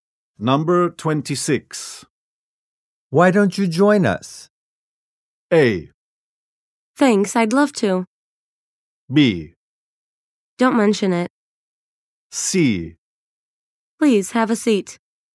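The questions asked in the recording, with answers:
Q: Why don't you join us?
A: A: Thanks, I'd love to.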